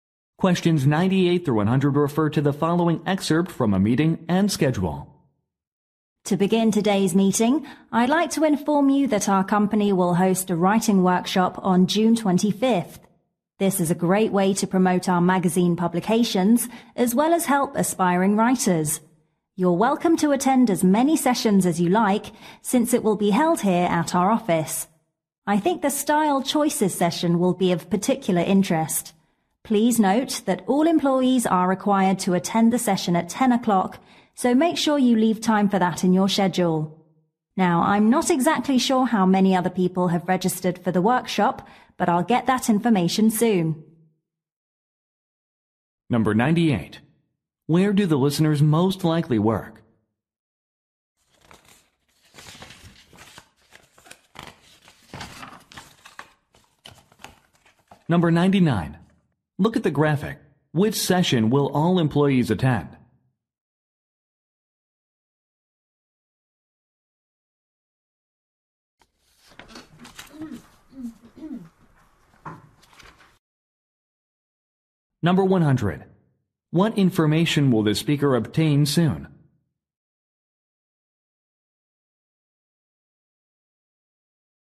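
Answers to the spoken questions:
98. At a magazine publisher
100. How many people have registered for the workshop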